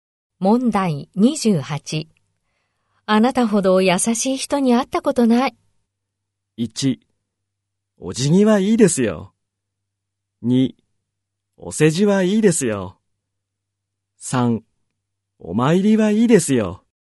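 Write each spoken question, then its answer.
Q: あなたほど優しい人に会ったことない。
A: 2: お世辞はいいですよ。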